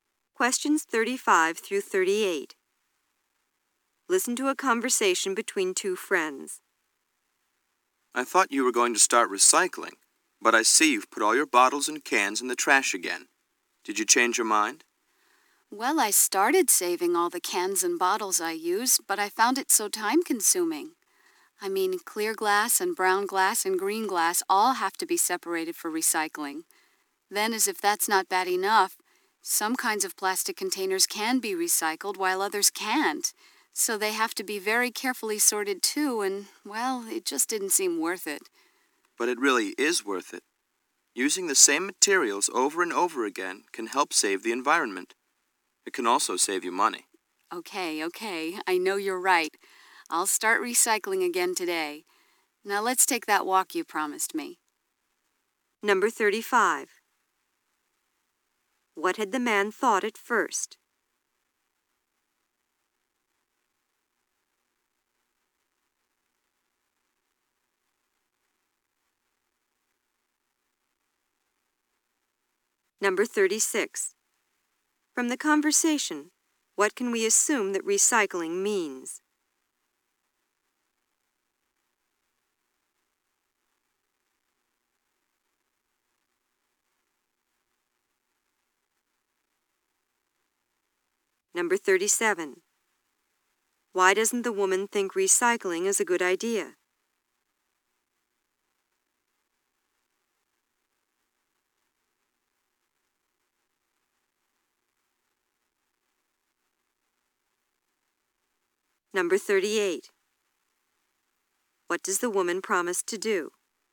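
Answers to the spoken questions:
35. That the woman was going to start recycling
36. Using the same materials over and over again
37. It takes too much time to sort things
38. Start recycling again today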